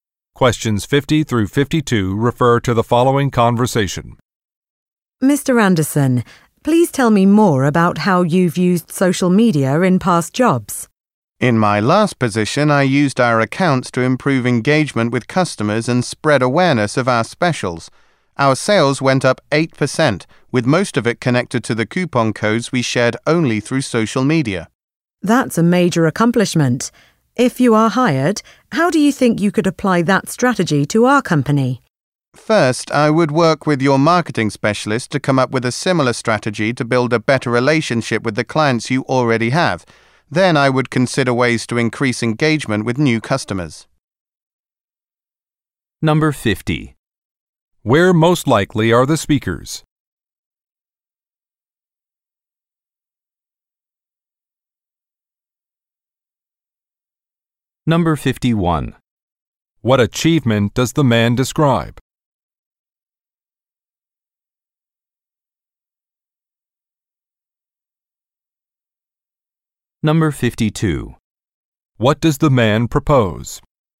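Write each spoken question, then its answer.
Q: Where most likely are the speakers?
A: At a job interview

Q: What achievement does the man describe?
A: Increasing sales by 8%

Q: What does the man propose?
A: Working with the marketing specialist to improve relationships with existing clients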